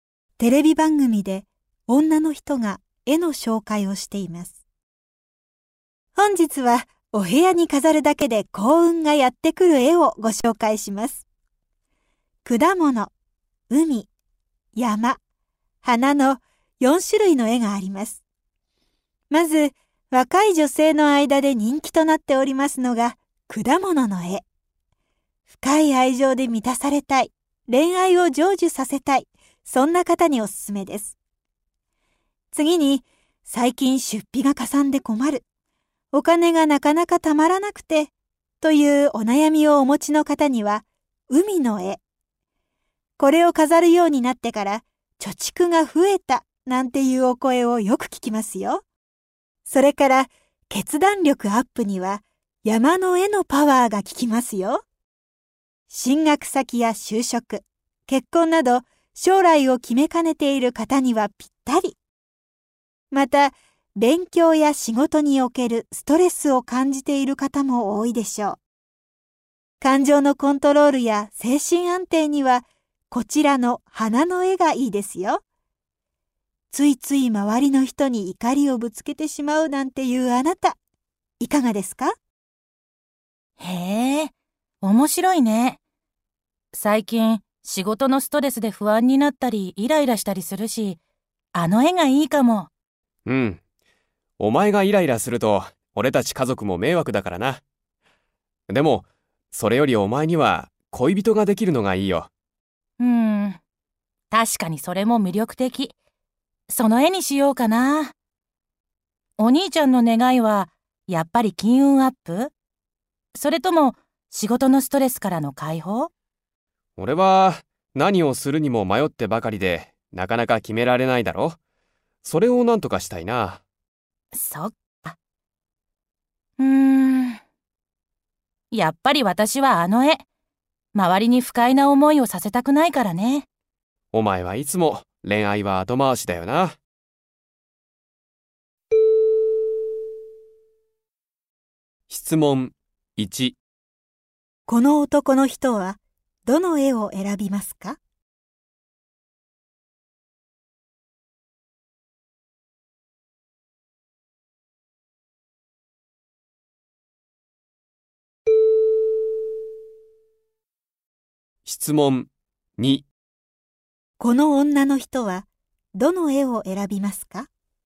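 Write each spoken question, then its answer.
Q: この男の人はどの絵を選びますか?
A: 山の絵

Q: この女の人はどの絵を選びますか?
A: 花の絵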